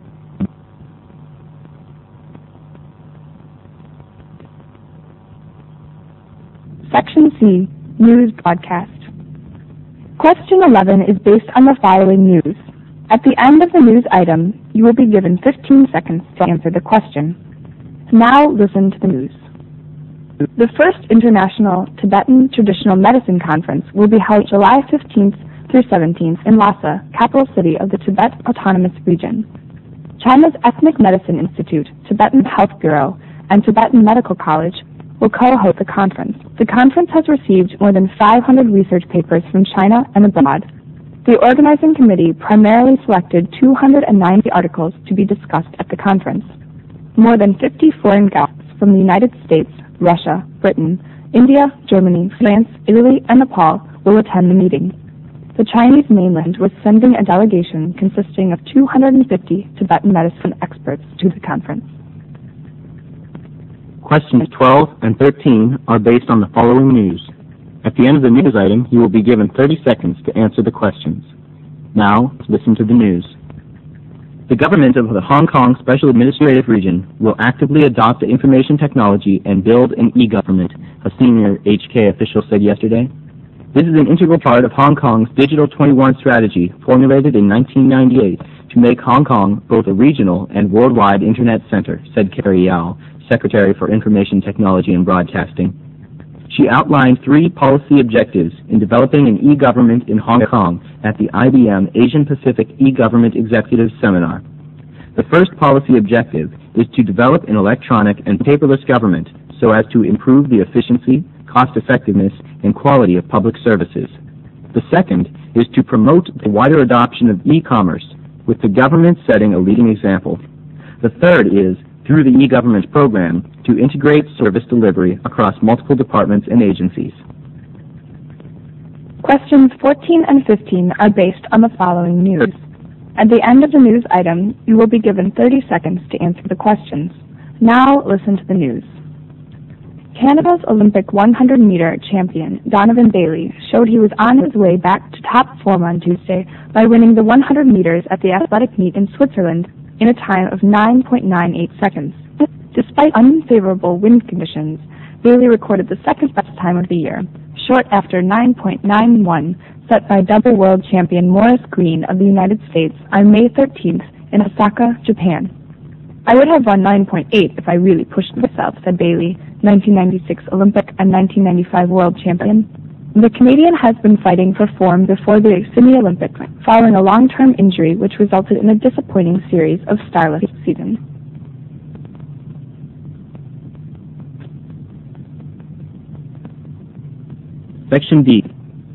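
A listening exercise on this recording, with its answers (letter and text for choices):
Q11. The news item is mainly about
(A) a call for research papers to be read at the conference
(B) an international conference on traditional Tibetan medicine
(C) the number of participants at the conference and their nationalities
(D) the preparations made by the sponsors for the international conference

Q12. The news item mainly concerns in Hong Kong.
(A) Internet centres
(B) an IBM seminar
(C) e-government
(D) broadcasting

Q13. The aims of the three policy objectives include all the following EXCEPT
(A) improvement of government efficiency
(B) promotion of e-commerce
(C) integration of service delivery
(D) formulation of Digital 21 Strategy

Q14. Which of the following records was the second best time of the year by Donovan Bailey?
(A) 9.98.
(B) 9.80.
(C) 9.91.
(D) 9.95.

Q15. The record shows that Bailey was .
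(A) still suffering from an injury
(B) getting back in shape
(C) unable to compete with Greene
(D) less confident than before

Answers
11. (B) an international conference on traditional Tibetan medicine
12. (C) e-government
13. (D) formulation of Digital 21 Strategy
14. (A) 9.98.
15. (B) getting back in shape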